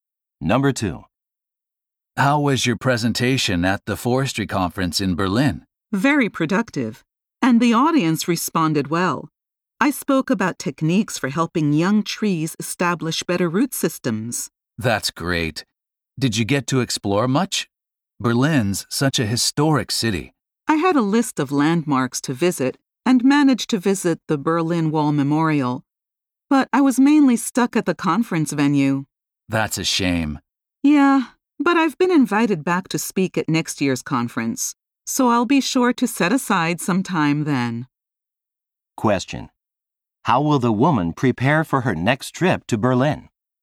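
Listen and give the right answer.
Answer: She will set aside time to see the city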